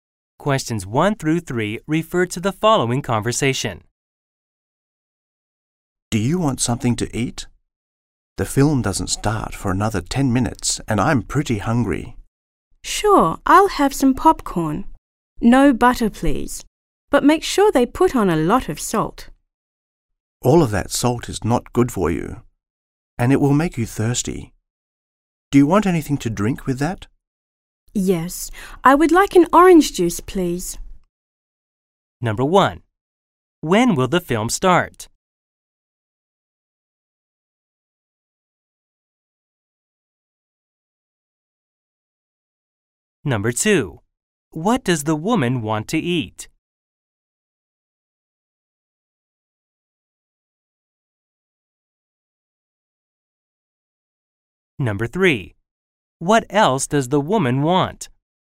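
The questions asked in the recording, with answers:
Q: When will the film start?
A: In 10 minutes

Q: What does the woman want to eat?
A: Popcorn with salt, no butter

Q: What else does the woman want?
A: An orange juice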